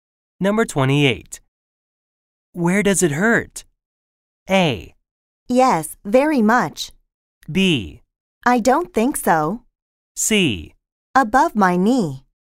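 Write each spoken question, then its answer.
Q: Where does it hurt?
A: C: Above my knee.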